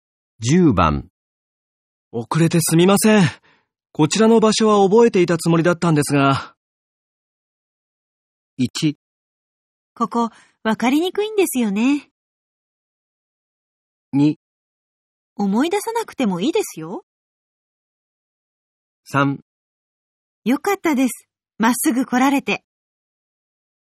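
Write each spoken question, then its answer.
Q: 遅れてすみません。こちらの場所は覚えていたつもりだったんですが。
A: 1: ここ、わかりにくいんですよね。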